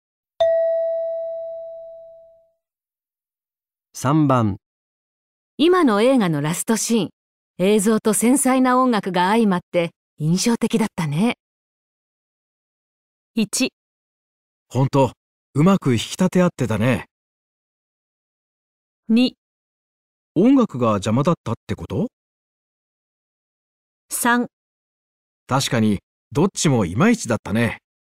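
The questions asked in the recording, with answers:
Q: 今の映画のラストシーン、映像と繊細な音楽が相まって印象的だったね。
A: 1: 本当、うまく引き立て合ってたね。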